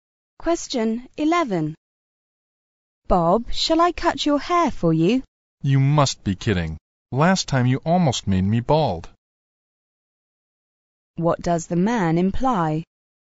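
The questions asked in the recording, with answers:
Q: What does the man imply?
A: He doesn't want her to cut his hair, because last time she did it badly.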